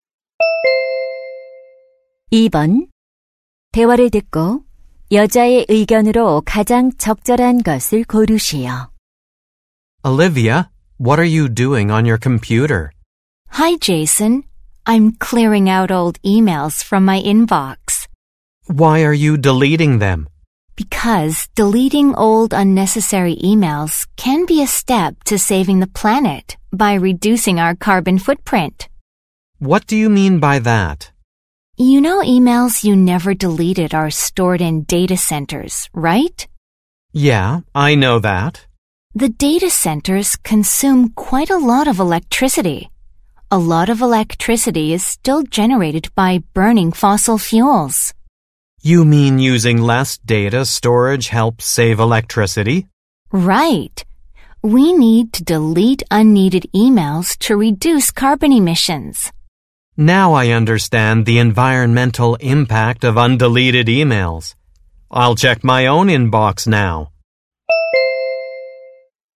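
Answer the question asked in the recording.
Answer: 불필요한 이메일을 삭제하면 탄소 배출을 줄일 수 있다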